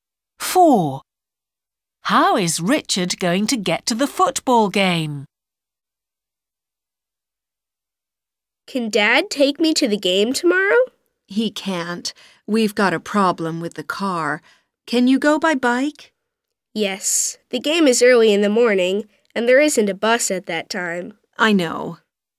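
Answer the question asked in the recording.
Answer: by bike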